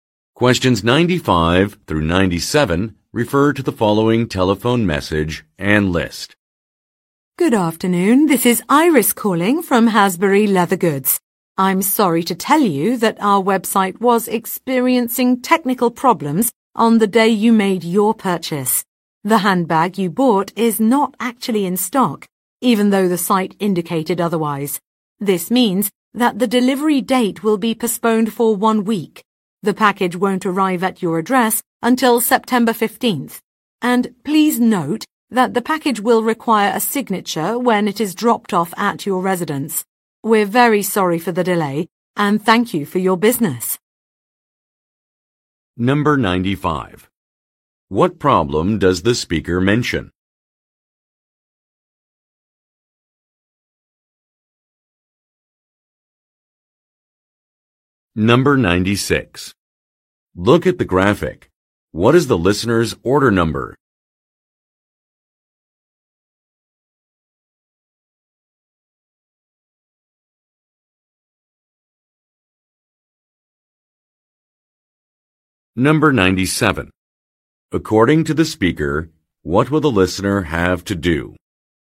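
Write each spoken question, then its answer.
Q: What problem does the speaker mention?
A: The handbag the listener bought is out of stock because of a website error, so delivery is delayed

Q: According to the speaker, what will the listener have to do?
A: Sign for the package when it is delivered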